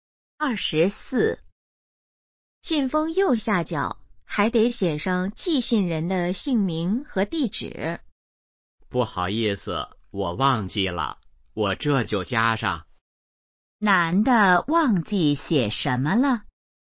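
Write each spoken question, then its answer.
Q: 男的忘记写什么了?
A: 寄信人的姓名和地址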